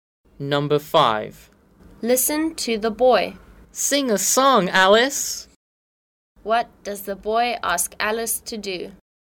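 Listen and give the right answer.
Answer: Sing a song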